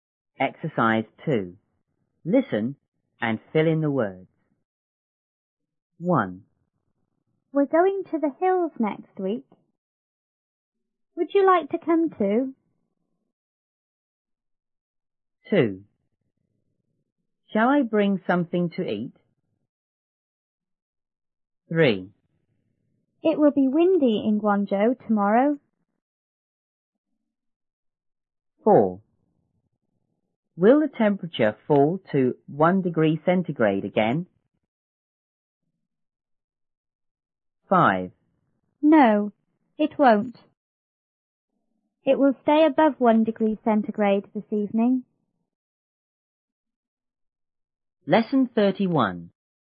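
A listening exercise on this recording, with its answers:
2.Listen and fill in the words.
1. We're ____ ____ the ____ next week.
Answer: going to; hills

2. ____ ____ ____ something to eat?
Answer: Shall I bring

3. It will be ______ in Guangzhou ______.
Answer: windy; tomorrow

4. Will the temperature ____ ___ 1°C again?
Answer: fall to

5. It ______ ______ above 1°C this evening.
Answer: will stay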